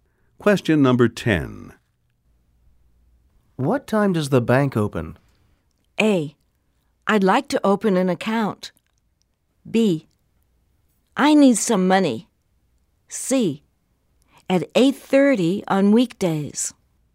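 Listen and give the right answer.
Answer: C: At 8:30 on weekdays.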